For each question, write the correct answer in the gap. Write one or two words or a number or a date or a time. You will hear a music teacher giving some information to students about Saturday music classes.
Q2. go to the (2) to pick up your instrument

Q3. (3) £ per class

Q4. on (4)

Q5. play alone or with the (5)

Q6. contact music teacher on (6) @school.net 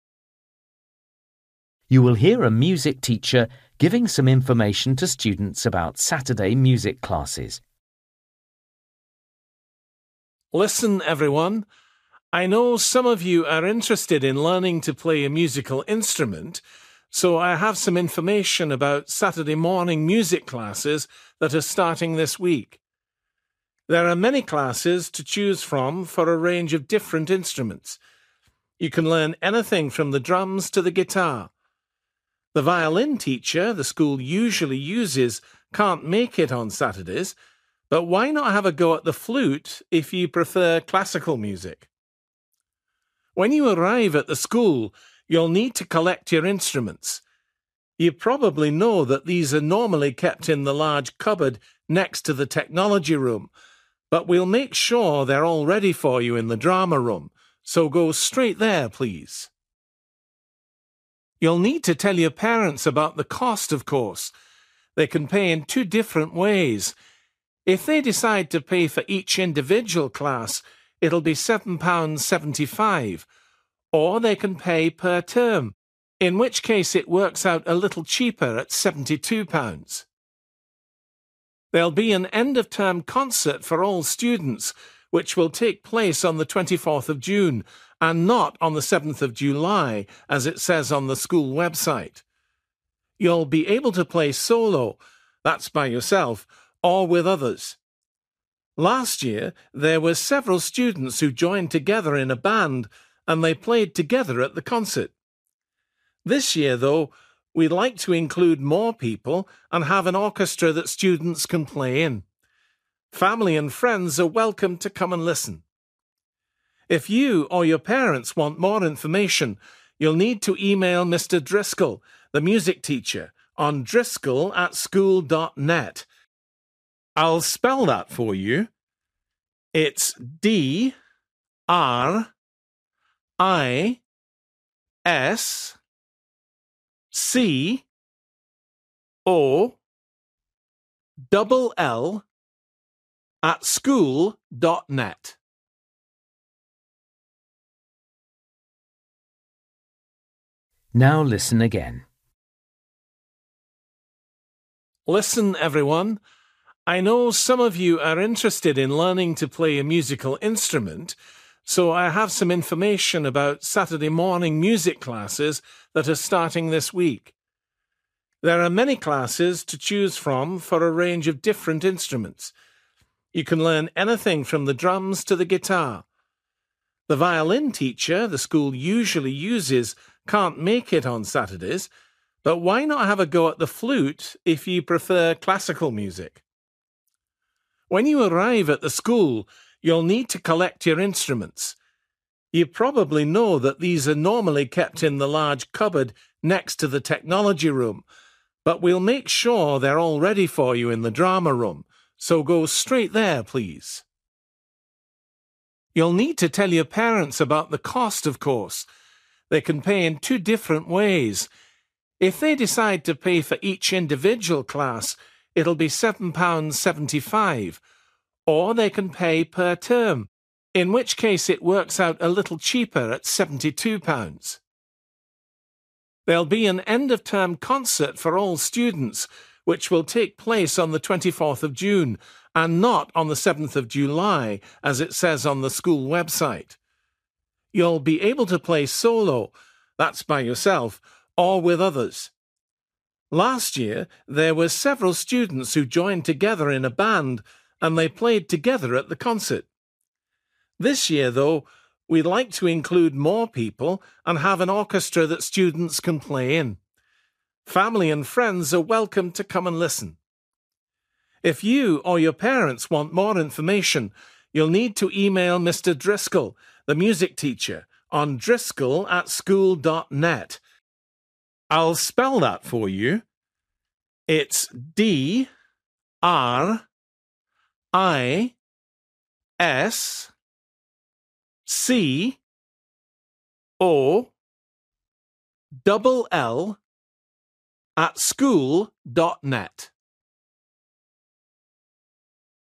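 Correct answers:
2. drama room
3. 7.75
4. 24th June
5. orchestra
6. driscoll

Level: Luyện nghe trình độ B1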